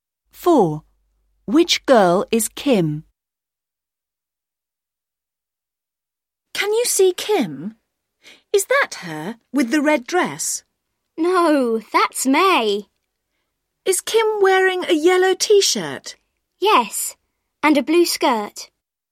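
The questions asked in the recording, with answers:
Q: Which girl is Kim?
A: The girl in a yellow T-shirt and a blue skirt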